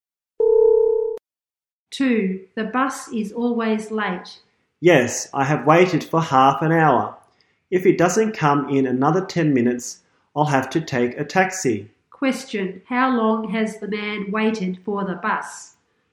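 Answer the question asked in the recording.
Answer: 30 minutes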